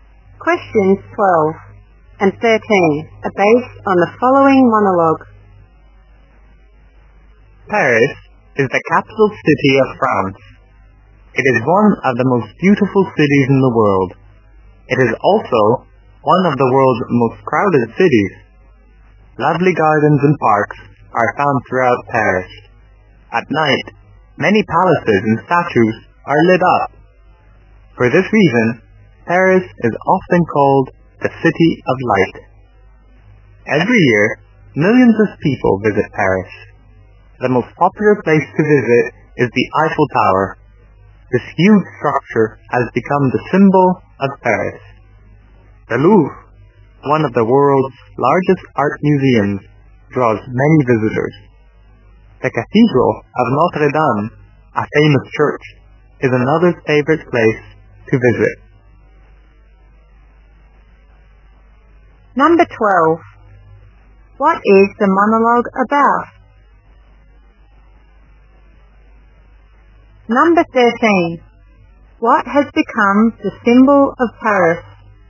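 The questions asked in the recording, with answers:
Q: What is the monologue about?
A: Paris

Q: What has become the symbol of Paris?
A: The Eiffel Tower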